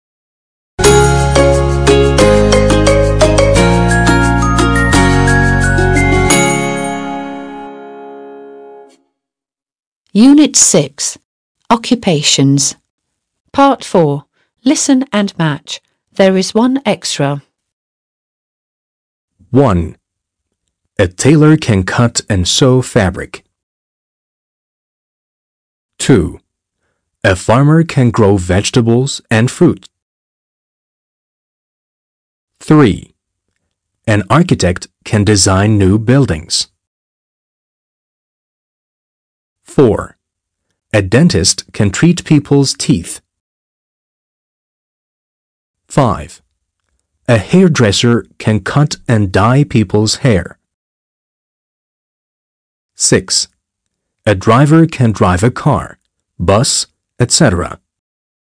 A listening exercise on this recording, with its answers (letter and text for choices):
4. Listen and match. There is one extra.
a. can grow vegetables and fruit.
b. can treat people's teeth.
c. can cut and sew fabric.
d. can design new buildings.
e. can drive a car, bus, etc.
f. can cut and dye people's hair.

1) A tailor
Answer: c. can cut and sew fabric.

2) A farmer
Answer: a. can grow vegetables and fruit.

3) An architect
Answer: d. can design new buildings.

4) A dentist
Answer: b. can treat people's teeth.

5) A hairdresser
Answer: f. can cut and dye people's hair.

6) A driver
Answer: e. can drive a car, bus, etc.

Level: 6. Sınıf